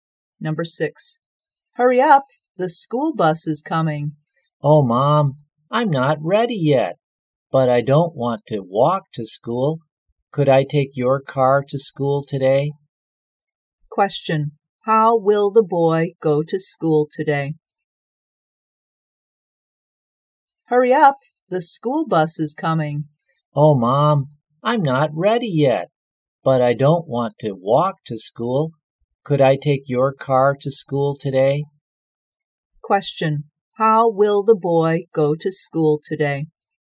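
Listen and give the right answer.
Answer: By car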